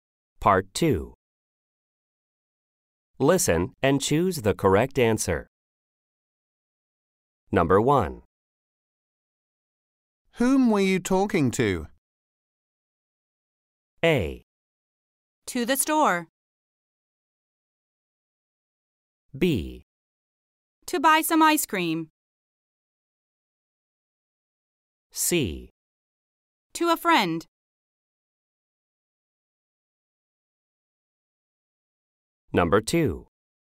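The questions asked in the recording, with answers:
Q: Whom were you talking to?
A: C: To a friend.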